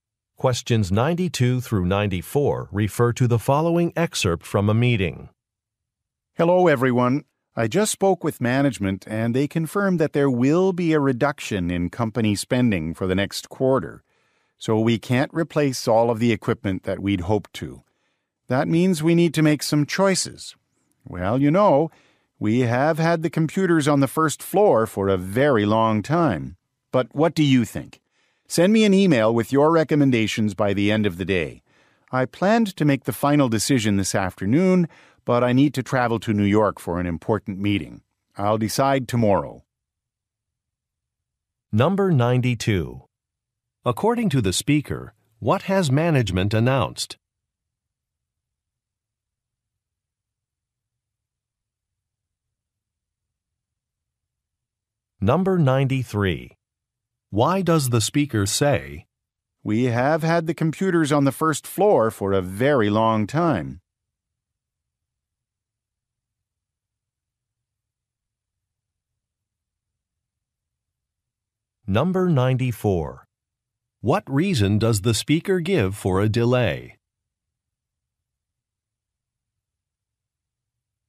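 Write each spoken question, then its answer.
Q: According to the speaker, what has management announced?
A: A reduction in company spending

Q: What reason does the speaker give for a delay?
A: She must travel to New York for a meeting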